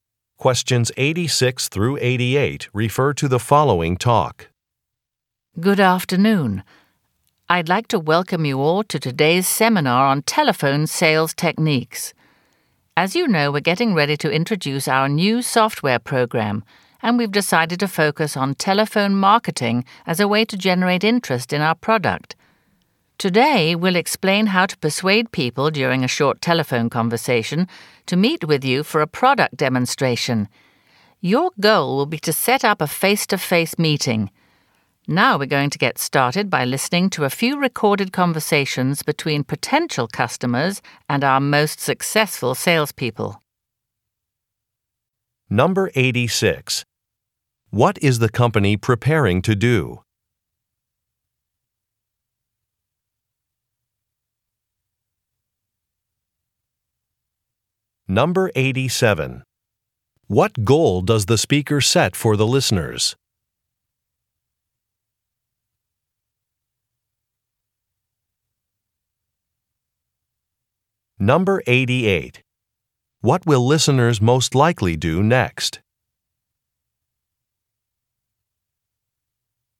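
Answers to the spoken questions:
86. Introduce a new software program
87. To set up face-to-face meetings with potential customers
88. Listen to recorded sales conversations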